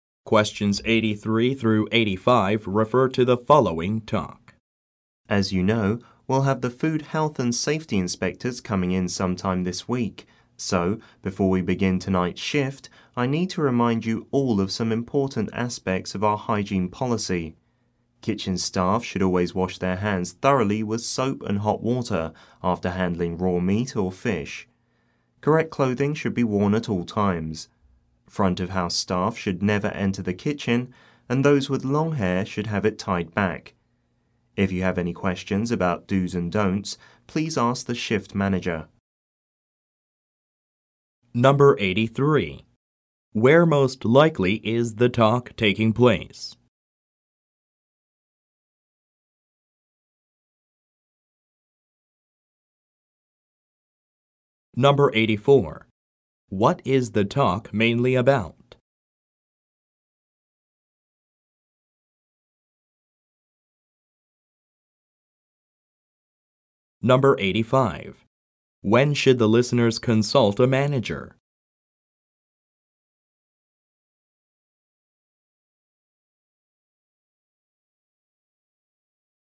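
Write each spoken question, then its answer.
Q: Where most likely is the talk taking place?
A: At a restaurant

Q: What is the talk mainly about?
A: The hygiene policy

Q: When should the listeners consult a manager?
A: If they have questions about do's and don'ts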